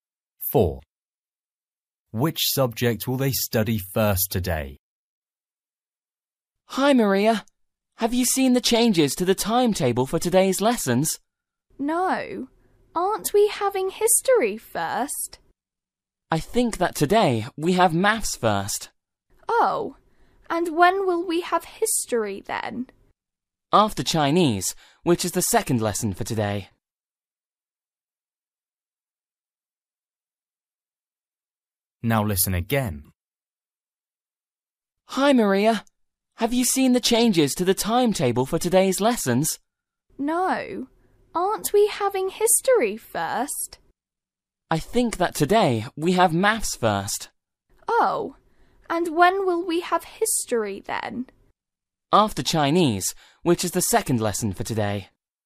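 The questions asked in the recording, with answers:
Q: Which subject will they study first today?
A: Maths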